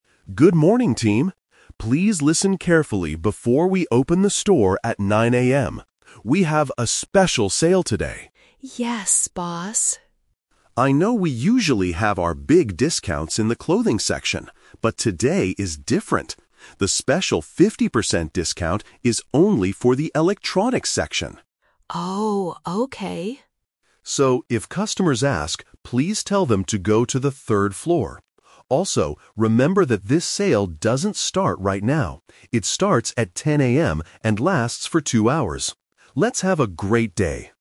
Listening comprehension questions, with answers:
Listen to the announcement and choose the correct answer (A, B, or C) for each question.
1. Which section has the special discount today?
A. The clothing section.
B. The electronics section.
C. The furniture section.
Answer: The electronics section.

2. What time does the special sale begin?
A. At 9:00 AM.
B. At 10:00 AM.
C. At 12:00 PM.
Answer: At 10:00 AM.

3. What should the staff tell the customers to do?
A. Go to the third floor.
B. Wait at the front door.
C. Go to the clothing section.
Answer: Go to the third floor.

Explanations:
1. This is "The Twist". The manager says they usually have discounts in the clothing section, but today the discount "is only for the electronics section." Why the trap is wrong: Option (A) is the trap. The clothing section is mentioned, but it is their usual habit, not today's plan. Option (C) is a plausible section in a store, but it is never mentioned.
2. The manager clearly states, "It starts at 10 AM." Why the trap is wrong: Option (A) is the trap. 9 AM is the time the department store opens, not the time the sale starts. Option (C) is when the sale finishes (2 hours after 10 AM), not when it begins.
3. The manager instructs the team: "if customers ask, please tell them to go to the third floor." Why the trap is wrong: Option (C) is a trap using a location mentioned earlier in the audio, but it is not where the sale is. Option (B) is plausible before opening time, but it is not what the manager tells the staff to say.

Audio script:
Manager: Good morning, team! Please listen carefully before we open the store at 9 AM. We have a special sale today.
Staff crowd: Yes, boss.
Manager: I know we usually have our big discounts in the clothing section. But today is different. The special 50% discount is only for the electronics section.
Staff crowd: Oh, okay.
Manager: So, if customers ask, please tell them to go to the third floor. Also, remember that this sale doesn't start right now.

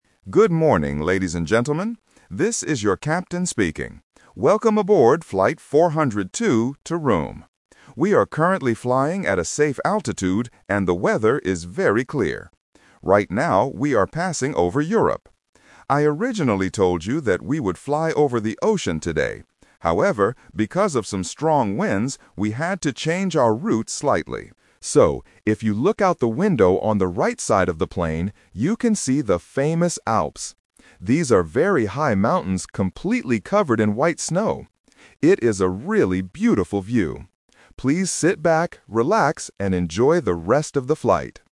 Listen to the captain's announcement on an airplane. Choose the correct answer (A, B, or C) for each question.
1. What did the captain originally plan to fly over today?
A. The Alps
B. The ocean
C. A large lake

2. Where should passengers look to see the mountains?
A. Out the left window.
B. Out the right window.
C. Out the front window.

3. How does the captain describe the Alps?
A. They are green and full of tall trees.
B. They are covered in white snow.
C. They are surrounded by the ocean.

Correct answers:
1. The ocean
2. Out the right window.
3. They are covered in white snow.

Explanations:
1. Why B is correct: The captain explicitly states the first plan using the past tense: "I originally told you that we would fly over the ocean today." Why A is a trap: The Alps are what they are flying over right now because of the changed route, not the original plan. Why C is wrong: A large lake is a geographical feature, but it is never mentioned in the announcement.
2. Why B is correct: The captain directs the passengers clearly: "look out the window on the right side of the plane..." Why A is a trap: "Left" is a very common distractor for directions, but it is incorrect here. Why C is wrong: Passengers cannot look out the front window; that is for the pilots.
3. Why B is correct: The captain describes the mountains directly: "These are very high mountains completely covered in white snow." Why A is wrong: Green trees are not mentioned. Why C is a trap: The "ocean" is mentioned earlier in the audio as the original flight path, but the mountains themselves are not surrounded by the ocean.

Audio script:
Captain: Good morning, ladies and gentlemen. This is your captain speaking. Welcome aboard flight 402 to Rome. We are currently flying at a safe altitude and the weather is very clear. Right now, we are passing over Europe. I originally told you that we would fly over the ocean today. However, because of some strong winds, we had to change our route slightly. So, if you look out the window on the right side of the plane, you can see the famous Alps. These are very high mountains completely covered in white snow. It is a really beautiful view. Please sit back, relax, and enjoy the rest of the flight.

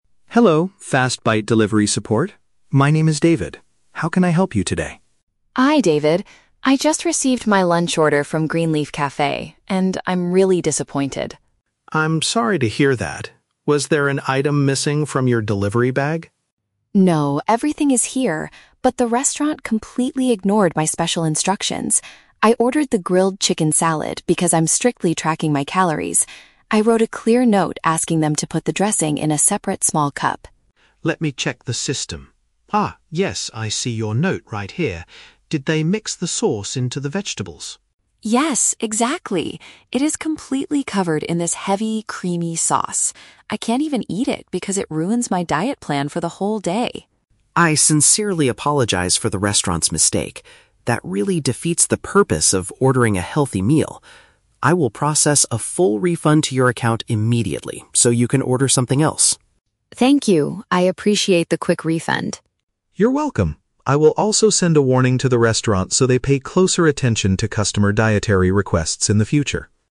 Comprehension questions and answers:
Listen to a conversation between a customer and a delivery app agent. For each question, choose the correct answer (A, B, or C).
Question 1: Why is Lisa contacting customer service?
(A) To report that a part of her meal was not delivered.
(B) To complain that her food was prepared incorrectly.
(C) To ask for the nutritional information of a creamy sauce.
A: To complain that her food was prepared incorrectly.

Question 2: What was Lisa's specific request for her order?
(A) She wanted the restaurant to remove the grilled chicken.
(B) She asked for the liquid flavoring to be packed separately.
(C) She requested extra vegetables instead of the heavy sauce.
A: She asked for the liquid flavoring to be packed separately.

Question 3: How does the agent resolve the situation?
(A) He sends a new, healthy salad to her address right away.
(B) He contacts the delivery driver to return the wrong food.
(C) He returns her money and promises to inform the food maker.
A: He returns her money and promises to inform the food maker.

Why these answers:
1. Lisa states that the restaurant "completely ignored my special instructions" when preparing her salad. Option (A) is a trap; David asks, "Was there an item missing," but Lisa immediately replies, "No, everything is here." Option (C) is a trap; she mentions the sauce is heavy and high in calories, but she isn't asking the agent for its nutritional facts.
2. Lisa says she wrote a note asking them to "put the dressing in a separate small cup" (which means packing the liquid flavoring separately). Option (A) is a trap; she ordered the grilled chicken, she didn't ask to remove it. Option (C) is a trap; she wanted the sauce on the side, not replaced with extra vegetables.
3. David says he will "process a full refund" (return her money) and "send a warning to the restaurant" (inform the food maker). Option (A) is a trap; he tells her she can order something else with the refunded money, but he does not send a new salad himself. Option (B) is not mentioned in the audio.

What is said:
David: Hello, FastBite Delivery support. My name is David. How can I help you today?
Lisa: Hi David. I just received my lunch order from Green Leaf Cafe, and I'm really disappointed.
David: I'm sorry to hear that. Was there an item missing from your delivery bag?
Lisa: No, everything is here. But the restaurant completely ignored my special instructions. I ordered the grilled chicken salad because I'm strictly tracking my calories. I wrote a clear note asking them to put the dressing in a separate small cup.
David: Let me check the system... Ah, yes, I see your note right here. Did they mix the sauce into the vegetables?
Lisa: Yes, exactly! It is completely covered in this heavy, creamy sauce. I can't even eat it because it ruins my diet plan for the whole day.
David: I sincerely apologize for the restaurant's mistake. That really defeats the purpose of ordering a healthy meal. I will process a full refund to your account immediately so you can order something else.
Lisa: Thank you, I appreciate the quick refund.
David: You're welcome. I will also send a warning to the restaurant so they pay closer attention to customer dietary requests in the future.

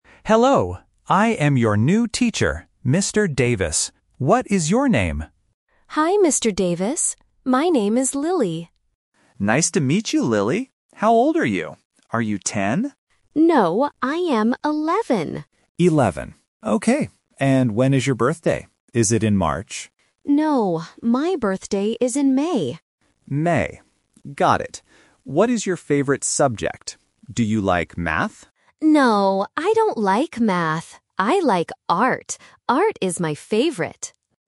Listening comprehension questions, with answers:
Listen to the conversation between a teacher and a new student. Circle the correct answer for each question.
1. How old is Lily?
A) 10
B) 11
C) 12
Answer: 11

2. When is Lily's birthday?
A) In March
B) In April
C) In May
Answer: In May

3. What is Lily's favorite subject?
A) Art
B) Math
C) Music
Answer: Art

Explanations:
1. Lily says clearly, "I am 11." Option (A) 10 is the trap because the teacher asks "Are you 10?", but Lily says "No." Option (C) 12 is never mentioned.
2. Lily states, "my birthday is in May." Option (A) March is the trap because the teacher guesses it, but is corrected. Option (B) April is a plausible month but is not in the audio.
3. Lily says, "I like Art." Option (B) Math is the trap because the teacher asks about it, but Lily says "I don't like Math." Option (C) Music is not mentioned.

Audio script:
Teacher: Hello. I am your new teacher, Mr. Davis. What is your name?
Lily: Hi, Mr. Davis. My name is Lily.
Teacher: Nice to meet you, Lily. How old are you? Are you 10?
Lily: No, I am 11.
Teacher: 11. Okay. And when is your birthday? Is it in March?
Lily: No, my birthday is in May.
Teacher: May. Got it. What is your favorite subject? Do you like Math?
Lily: No, I don't like Math. I like Art. Art is my favorite.

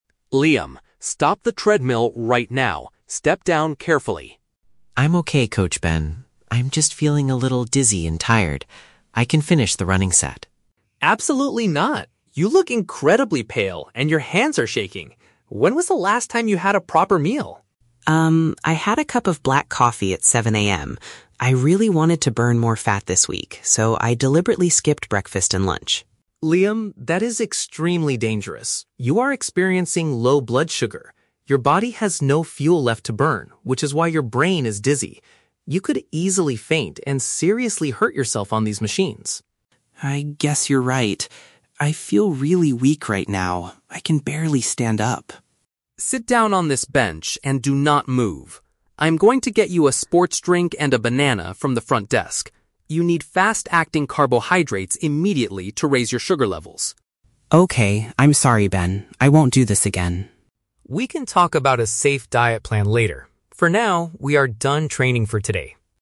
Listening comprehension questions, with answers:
Listen to a conversation between a gym-goer and a personal trainer. For each question, choose the correct answer (A, B, or C).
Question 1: Why does Coach Ben order Liam to stop running?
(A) Liam is using the exercise machine incorrectly.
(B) Liam is showing physical signs of extreme weakness.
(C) Liam has successfully completed his daily fitness goal.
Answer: Liam is showing physical signs of extreme weakness.

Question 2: What is the primary cause of Liam's current physical condition?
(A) He drank a very strong cup of coffee early in the morning.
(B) He intentionally avoided eating food to lose weight faster.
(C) He consumed a heavy meal right before stepping on the treadmill.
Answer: He intentionally avoided eating food to lose weight faster.

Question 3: What is Coach Ben's immediate plan to help Liam?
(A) To bring him something sweet and easy to digest.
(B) To ask the front desk staff to call for an ambulance.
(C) To let him rest for five minutes before continuing the workout.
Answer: To bring him something sweet and easy to digest.

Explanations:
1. Ben tells Liam to stop because he looks "incredibly pale and your hands are shaking" (physical signs of extreme weakness). Option (A) is a trap; Liam is on a treadmill, but Ben doesn't say he is using it wrong. Option (C) is a trap; at the end of the audio, Ben says "we are done training for today", but Liam had not actually finished his set yet.
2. Liam admits that he "deliberately skipped breakfast and lunch" because he "wanted to burn more fat" (intentionally avoided eating to lose weight faster). Option (A) is a trap; he did drink black coffee, but lack of food (low blood sugar) is the cause of the dizziness, not the coffee itself. Option (C) is a trap; it is the exact opposite of what Liam did.
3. Ben tells Liam he is going to get "a sports drink and a banana... fast-acting carbohydrates" (which are sweet and easy to digest). Option (B) is a trap; the situation is dangerous, and Ben mentions the "front desk", but he goes there to get food, not to call an ambulance. Option (C) is a trap; Ben explicitly states, "we are done training for today."

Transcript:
Ben: Liam, stop the treadmill right now. Step down carefully.
Liam: I'm okay, Coach Ben. I'm just feeling a little dizzy and tired. I can finish the running set.
Ben: Absolutely not. You look incredibly pale and your hands are shaking. When was the last time you had a proper meal?
I had a cup of black coffee at 7 AM. I really wanted to burn more fat this week, so I deliberately skipped breakfast and lunch.
Ben: Liam, that is extremely dangerous. You are experiencing low blood sugar. Your body has no fuel left to burn, which is why your brain is dizzy. You could easily faint and seriously hurt yourself on these machines.
Liam: I guess you're right. I feel really weak right now. I can barely stand up.
Ben: Sit down on this bench and do not move. I'm going to get you a sports drink and a banana from the front desk. You need fast-acting carbohydrates immediately to raise your sugar levels.
Liam: Okay, I'm sorry, Ben. I won't do this again.
Ben: We can talk about a safe diet plan later. For now, we are done training for today.

